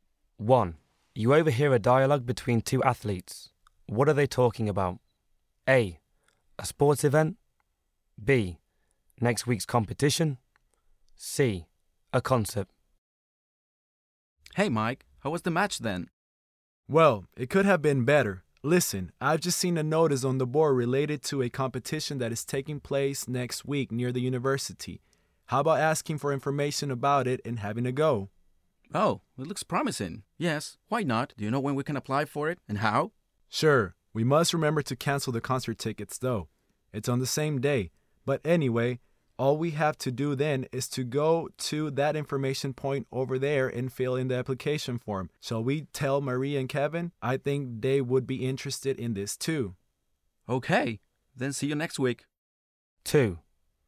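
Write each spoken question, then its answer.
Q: What are they talking about?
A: B: Next week's competition.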